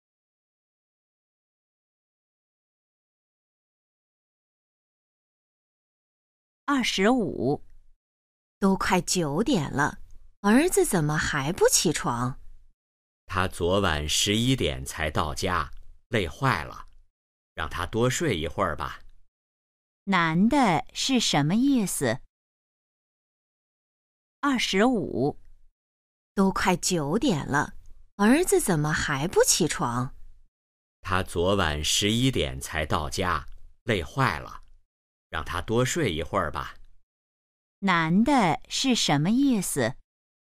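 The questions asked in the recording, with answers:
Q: 男的是什么意思?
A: 让儿子多睡一会儿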